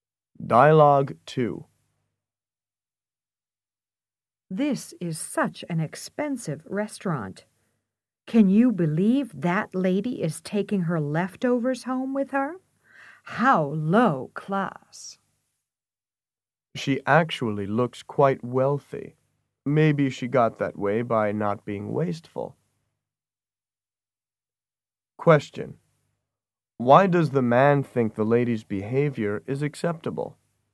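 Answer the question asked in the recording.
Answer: Maybe she became wealthy by not being wasteful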